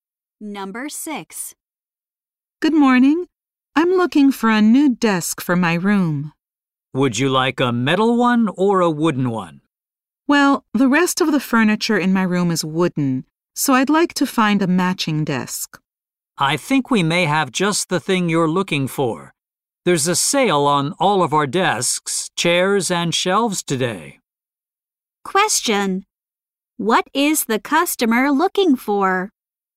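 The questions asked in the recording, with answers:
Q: What is the customer looking for?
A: A wooden desk to match her furniture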